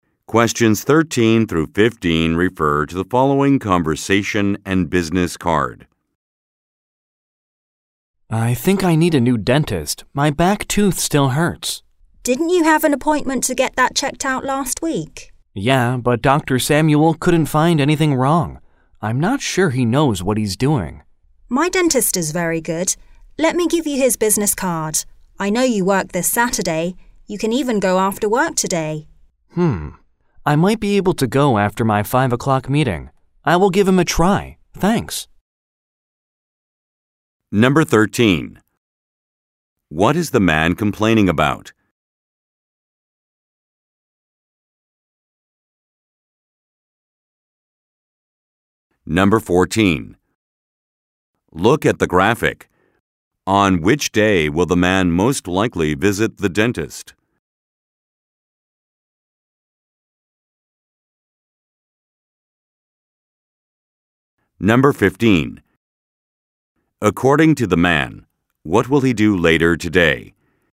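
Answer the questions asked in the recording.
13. His back tooth still hurts (a toothache).
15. Attend a 5 o'clock meeting.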